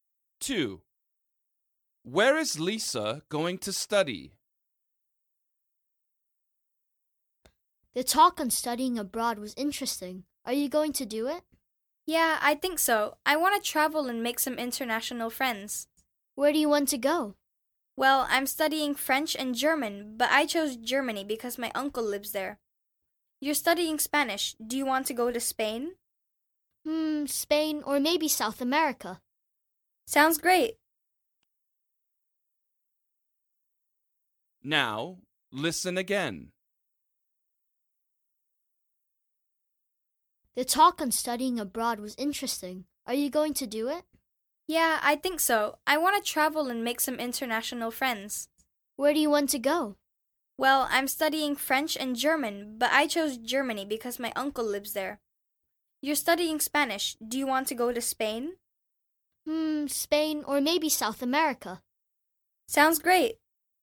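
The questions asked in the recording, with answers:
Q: Where is Lisa going to study?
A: Germany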